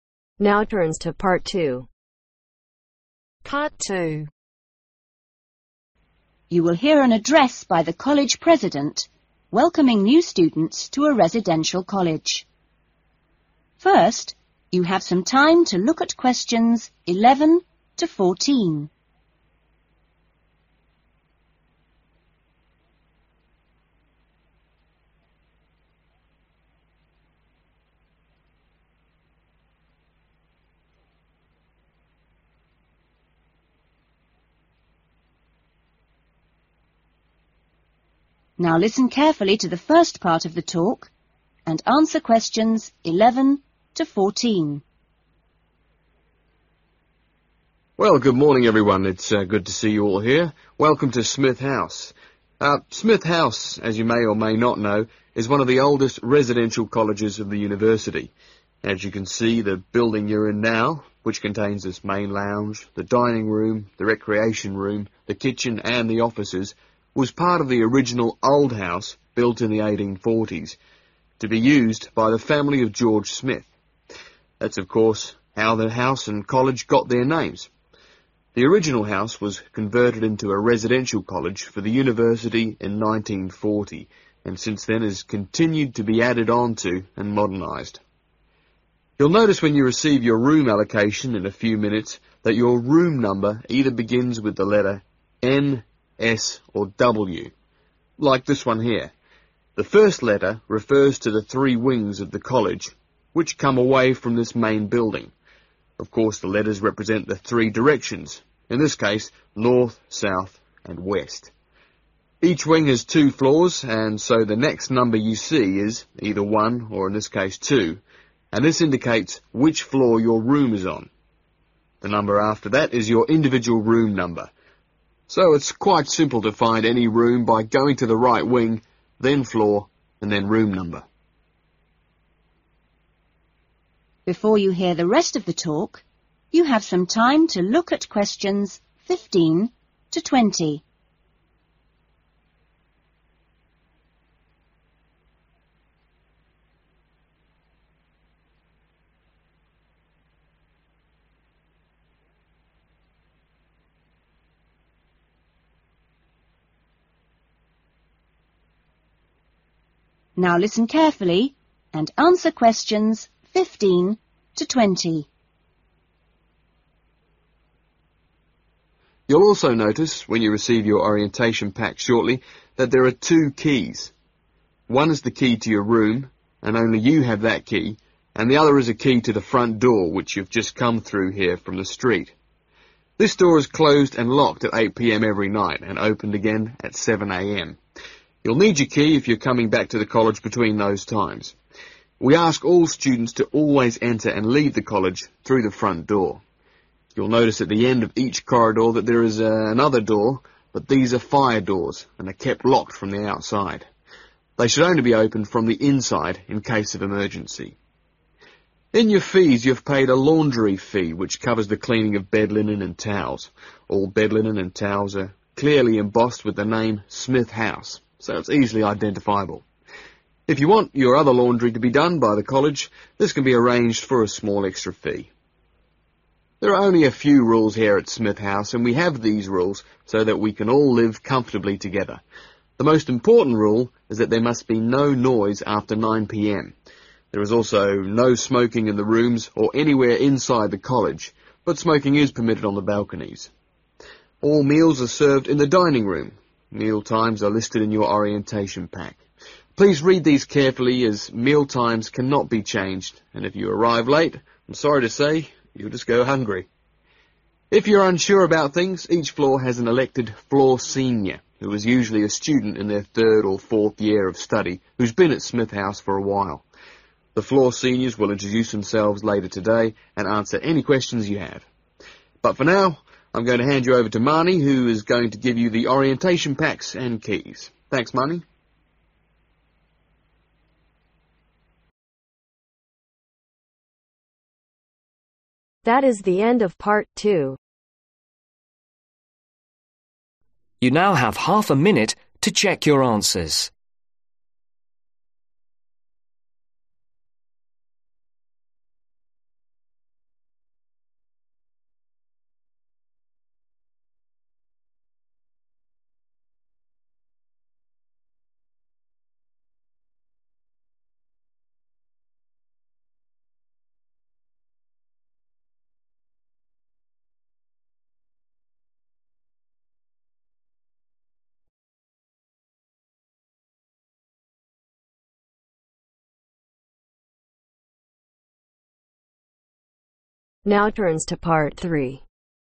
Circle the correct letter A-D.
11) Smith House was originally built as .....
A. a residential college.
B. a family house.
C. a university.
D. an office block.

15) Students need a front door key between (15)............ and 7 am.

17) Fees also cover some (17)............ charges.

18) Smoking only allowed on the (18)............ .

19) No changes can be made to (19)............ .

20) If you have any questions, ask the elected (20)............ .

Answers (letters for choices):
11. B
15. 8 pm
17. Laundry/washing
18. Balconies ACCEPT balcony's
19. Meal times
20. Floor senior(s)